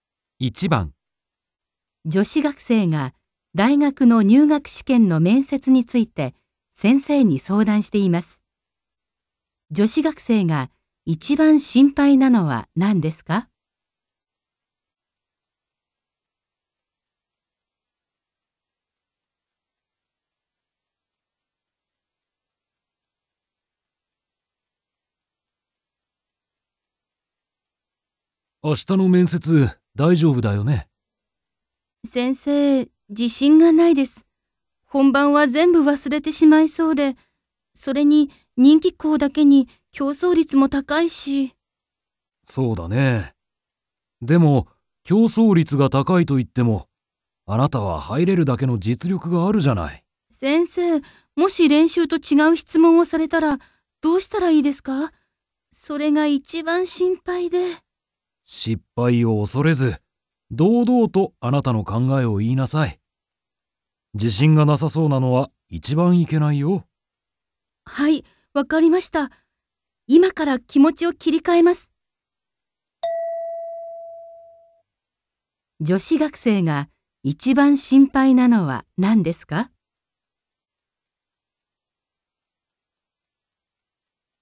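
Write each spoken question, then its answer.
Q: 女子学生が一番心配なのは何ですか?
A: 面接で練習と違う質問をされること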